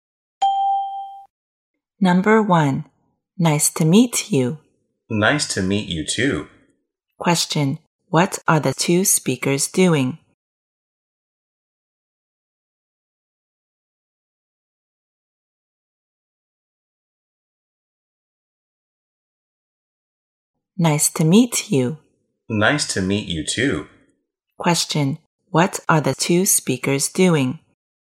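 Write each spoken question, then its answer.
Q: what are the two speakers doing?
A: Greeting each other when meeting for the first time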